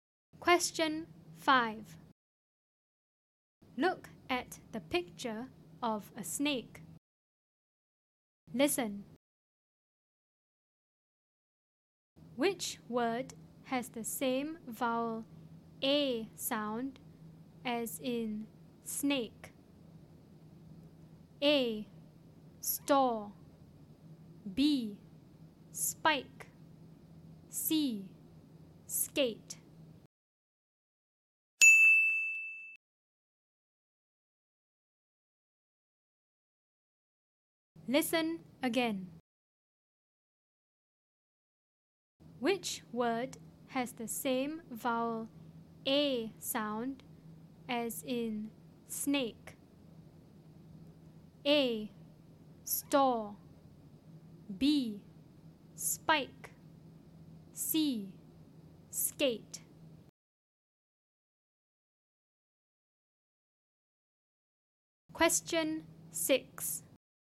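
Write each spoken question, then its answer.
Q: Which word has the same vowel A sound as in snake?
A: C: Skate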